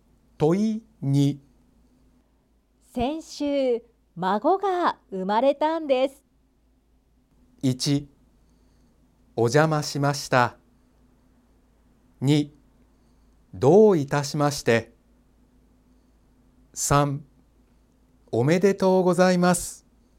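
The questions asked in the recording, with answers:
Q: 先週、孫が生まれたんです。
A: 3: おめでとうございます。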